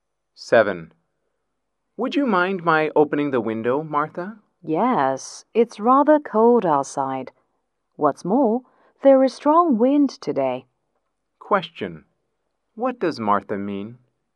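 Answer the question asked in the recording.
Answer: She doesn't want the window opened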